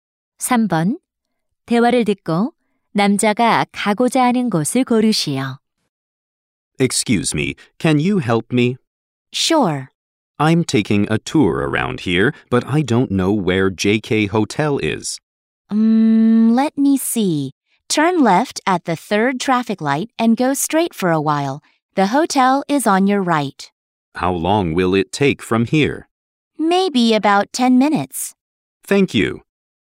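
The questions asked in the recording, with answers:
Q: 대화를 듣고 남자가 가고자 하는 곳을 고르시오.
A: JK 호텔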